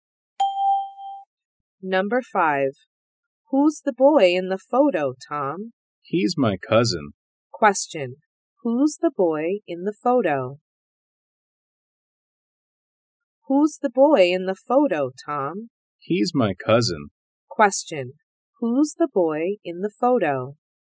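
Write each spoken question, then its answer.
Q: Who's the boy in the photo?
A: Tom's cousin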